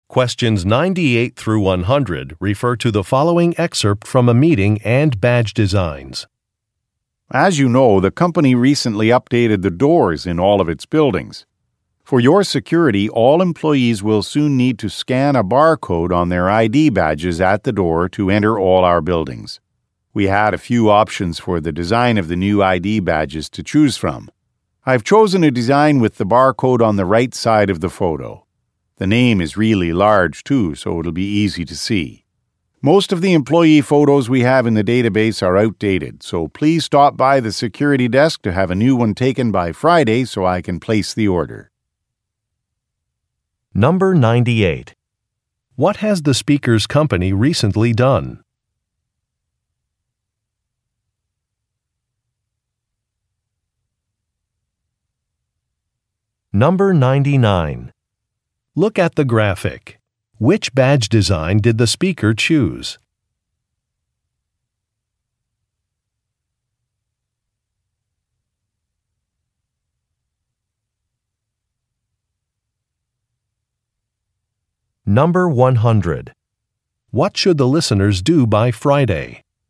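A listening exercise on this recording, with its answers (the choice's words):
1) What has the speaker's company recently done?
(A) It increased building security.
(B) It started an internship program.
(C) It merged with another company.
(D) It introduced a new logo.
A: It increased building security.

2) What should the listeners do by Friday?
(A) Have their photos taken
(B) Post their résumés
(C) Call a maintenance worker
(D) Submit a payment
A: Have their photos taken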